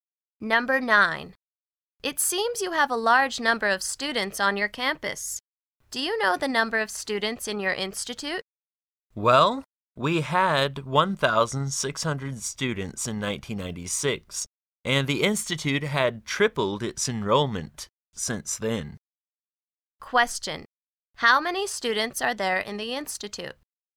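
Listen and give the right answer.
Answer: 4,800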